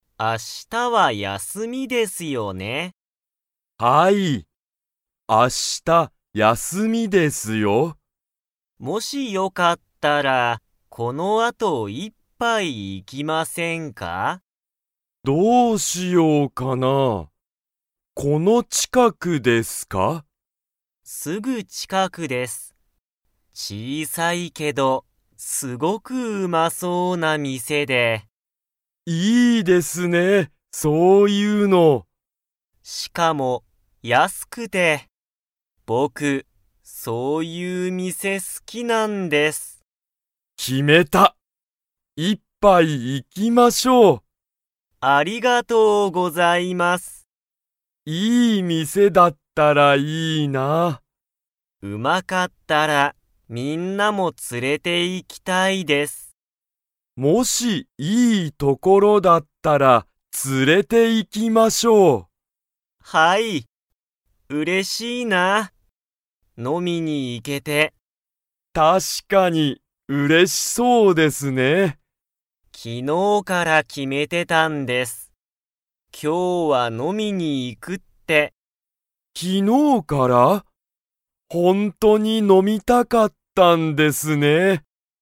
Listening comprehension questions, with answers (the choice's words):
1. その店(みせ)は、____。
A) 近ちかくだけど高(たか)そう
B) 小(ちい)さいけどうまそう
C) うまいけど高(たか)そう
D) 高(たか)いけど小(ちい)さそう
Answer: 小(ちい)さいけどうまそう

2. 高橋(たかはし)さんは飲(の)みに行(い)けて嬉(うれ)しいですか?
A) はい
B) いいえ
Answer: はい

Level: Level 2